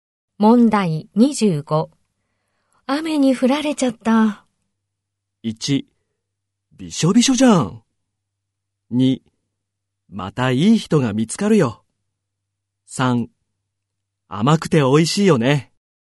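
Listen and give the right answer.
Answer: 1: びしょびしょじゃん。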